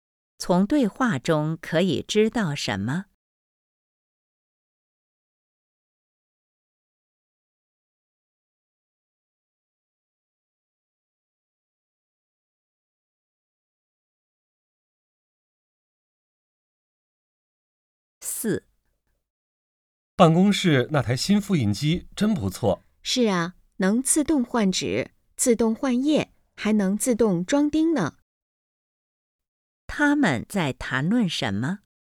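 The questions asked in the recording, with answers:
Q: 他们在谈论什么?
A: 办公室的新复印机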